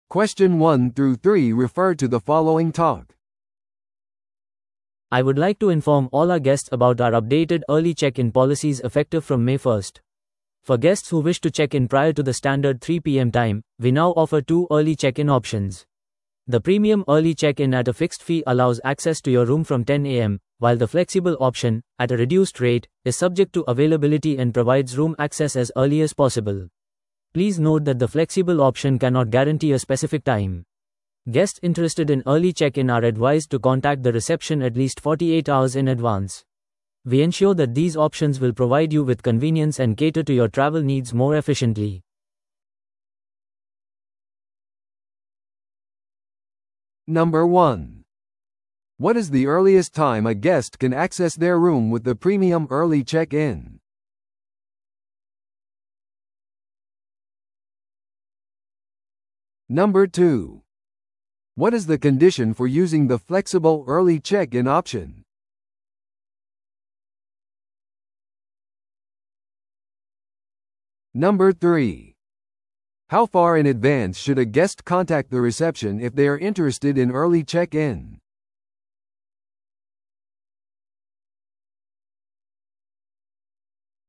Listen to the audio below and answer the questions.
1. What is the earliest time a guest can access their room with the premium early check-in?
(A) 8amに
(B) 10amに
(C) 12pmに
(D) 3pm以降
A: B

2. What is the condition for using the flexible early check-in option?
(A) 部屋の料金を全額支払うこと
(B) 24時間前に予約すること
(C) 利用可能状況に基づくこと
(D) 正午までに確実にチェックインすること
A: C

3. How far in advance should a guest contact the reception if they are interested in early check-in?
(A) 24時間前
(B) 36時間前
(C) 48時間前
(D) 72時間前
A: C

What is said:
I would like to inform all our guests about our updated early check-in policies effective from May 1st. For guests who wish to check in prior to the standard 3pm time, we now offer two early check-in options. The premium early check-in at a fixed fee allows access to your room from 10am, while the flexible option, at a reduced rate, is subject to availability and provides room access as early as possible. Please note that the flexible option cannot guarantee a specific time. Guests interested in early check-in are advised to contact the reception at least 48 hours in advance. We ensure that these options will provide you with convenience and cater to your travel needs more efficiently.

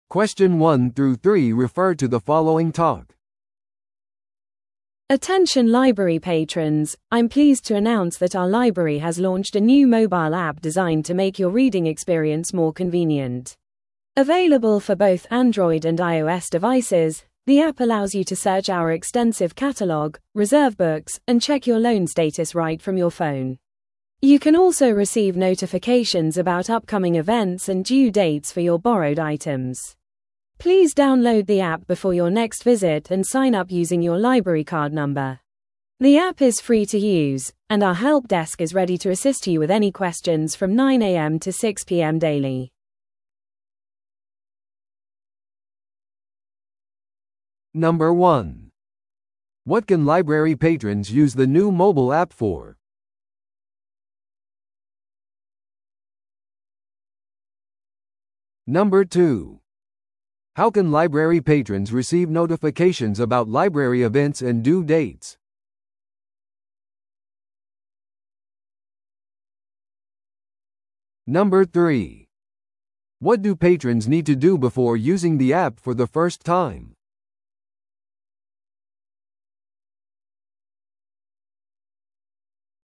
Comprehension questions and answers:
Listen to the audio below and answer the questions.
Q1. What can library patrons use the new mobile app for?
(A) 図書館のカフェで食事を注文する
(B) カードを使わずに図書館の本をチェックアウトする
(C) カタログを検索し、本を予約する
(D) 映画や音楽のストリーミング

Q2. How can library patrons receive notifications about library events and due dates?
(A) メールアップデートにサインアップすることで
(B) 新しいモバイルアプリを通じて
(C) 直接図書館を訪れることで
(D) 図書館のソーシャルメディアページで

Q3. What do patrons need to do before using the app for the first time?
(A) 一回限りのセットアップ料金を支払う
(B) 検証用の写真付きIDを提供する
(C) アプリをダウンロードし、図書館カード番号でサインアップする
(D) 図書館でのオリエンテーションに出席する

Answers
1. C
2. B
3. C

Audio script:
Attention library patrons, I'm pleased to announce that our library has launched a new mobile app designed to make your reading experience more convenient. Available for both Android and iOS devices, the app allows you to search our extensive catalog, reserve books, and check your loan status right from your phone. You can also receive notifications about upcoming events and due dates for your borrowed items. Please download the app before your next visit and sign up using your library card number. The app is free to use, and our help desk is ready to assist you with any questions from 9am to 6pm daily.

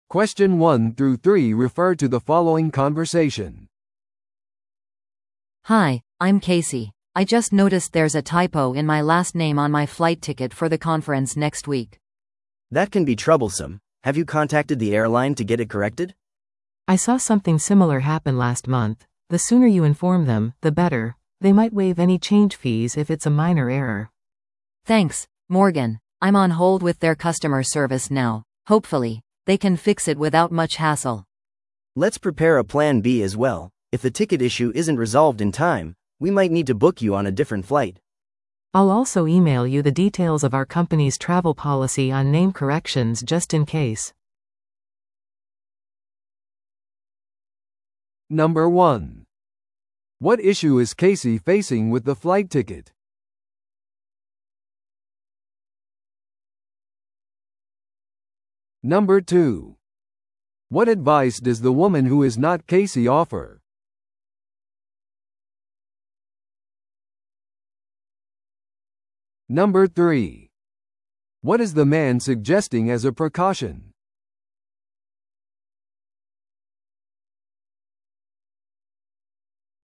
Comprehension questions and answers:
Listen to the audio below and answer the questions.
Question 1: What issue is Casey facing with the flight ticket?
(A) 新しいフライトを予約する必要がある。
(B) チケットに名前の綴りを間違えられている。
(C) チケットの追加料金が請求されている。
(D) 彼女の旅程に乗り継ぎが追加された。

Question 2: What advice does the woman who is not Casey offer?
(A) 旅行ポリシーに関する会社のメールを取得する。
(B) 予防措置として追加の座席を予約する。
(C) 旅行の問題に対する会社の保険を確認する。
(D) できるだけ早く航空会社に知らせる。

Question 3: What is the man suggesting as a precaution?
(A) 保険会社に連絡する。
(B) 更新された旅程を送る。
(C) 代替旅行プランを準備する。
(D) 会社の旅行ガイドをリクエストする。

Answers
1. B
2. D
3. C

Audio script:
A: Hi, I'm Casey. I just noticed there's a typo in my last name on my flight ticket for the conference next week.
B: That can be troublesome. Have you contacted the airline to get it corrected?
C: I saw something similar happen last month. The sooner you inform them, the better. They might waive any change fees if it's a minor error.
A: Thanks, Morgan. I'm on hold with their customer service now. Hopefully, they can fix it without much hassle.
B: Let's prepare a plan B as well. If the ticket issue isn't resolved in time, we might need to book you on a different flight.
C: I'll also email you the details of our company's travel policy on name corrections just in case.

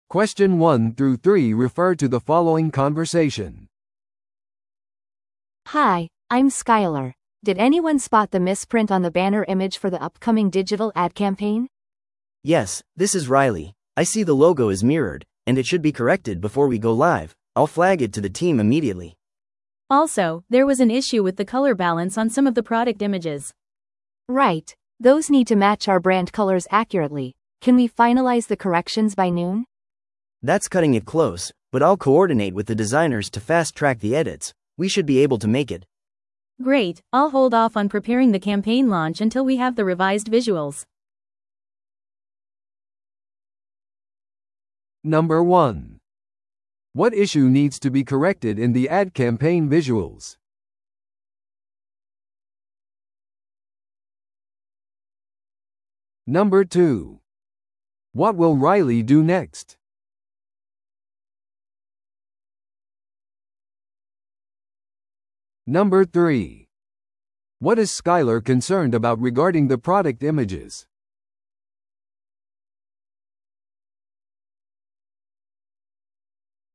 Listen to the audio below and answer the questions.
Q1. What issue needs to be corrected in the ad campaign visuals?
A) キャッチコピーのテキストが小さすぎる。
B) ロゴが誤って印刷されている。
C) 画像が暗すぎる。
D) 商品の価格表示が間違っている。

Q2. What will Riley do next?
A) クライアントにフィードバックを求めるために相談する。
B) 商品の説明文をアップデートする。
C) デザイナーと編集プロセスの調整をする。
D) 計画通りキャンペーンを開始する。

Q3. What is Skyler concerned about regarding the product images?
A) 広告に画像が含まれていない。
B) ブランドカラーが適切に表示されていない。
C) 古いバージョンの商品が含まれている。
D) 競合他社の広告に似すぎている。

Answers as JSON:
{"1": "B", "2": "C", "3": "B"}

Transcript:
Did anyone spot the misprint on the banner image for the upcoming digital ad campaign?
B: Yes, this is Riley. I see the logo is mirrored, and it should be corrected before we go live. I'll flag it to the team immediately.
C: Also, there was an issue with the color balance on some of the product images.
A: Right, those need to match our brand colors accurately. Can we finalize the corrections by noon?
B: That's cutting it close, but I'll coordinate with the designers to fast-track the edits. We should be able to make it.
C: Great, I'll hold off on preparing the campaign launch until we have the revised visuals.

